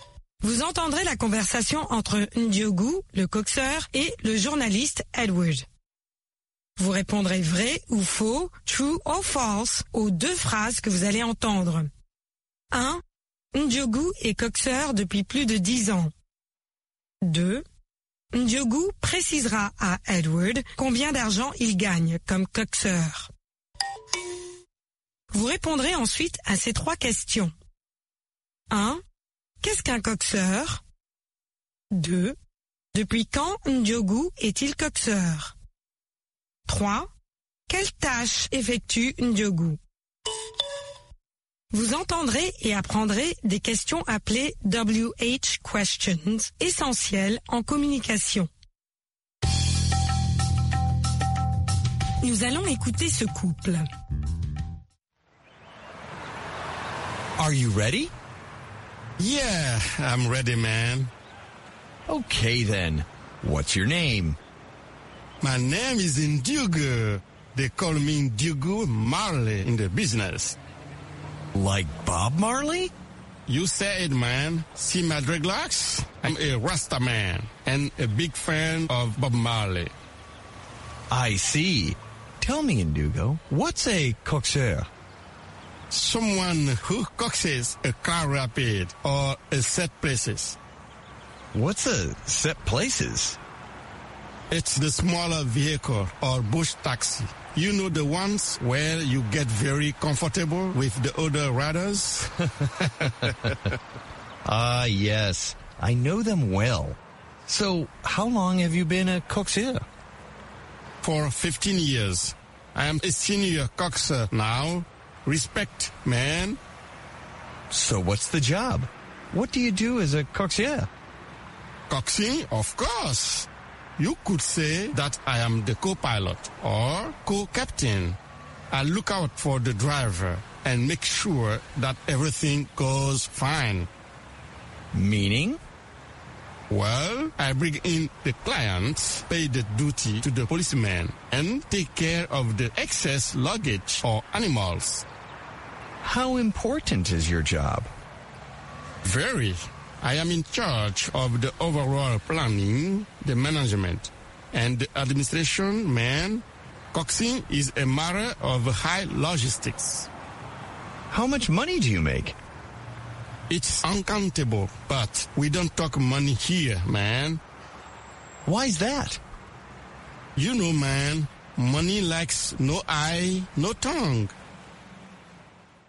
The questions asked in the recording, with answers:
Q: Ndiogou est coxeur depuis plus de 10 ans.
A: L'énoncé 1 est vrai.

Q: Ndiogou précisera à Edward combien d'argent il gagne comme coxeur.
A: L'énoncé 2 est faux.

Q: Qu'est-ce qu'un coxeur?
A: Quelqu'un qui coxe un véhicule.

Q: Depuis quand Ndiogou est-il coxeur?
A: Depuis 15 ans maintenant.

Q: Quelle tâche effectue Ndiogou?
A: Des tâches de planning, de gestion et d'administration.